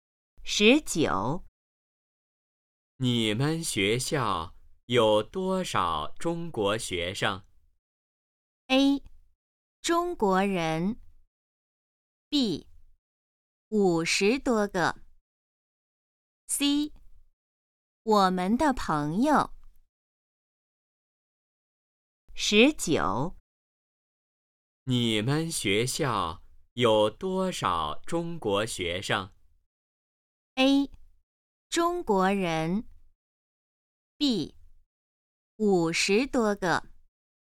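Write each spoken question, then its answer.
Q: 你们学校有多少中国学生?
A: B: 五十多个。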